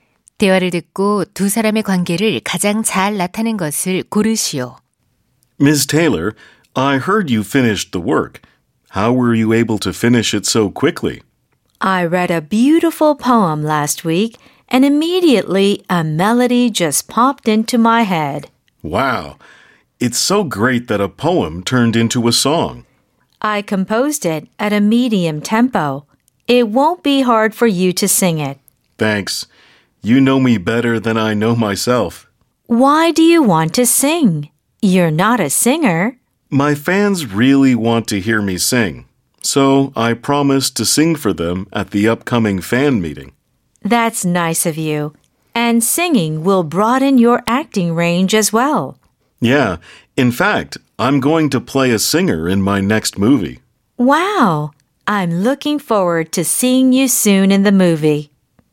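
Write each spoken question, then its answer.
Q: 대화를 듣고 두 사람의 관계를 가장 잘 나타낸 것을 고르시오.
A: 작곡가 - 배우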